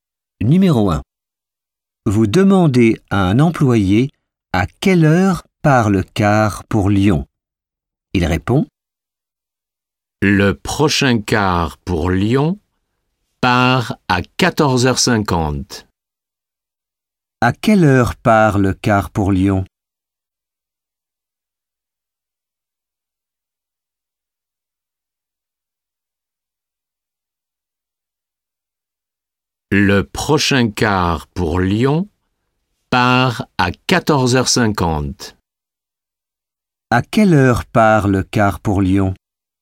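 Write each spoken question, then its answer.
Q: À quelle heure part le car pour Lyon?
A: À 14h50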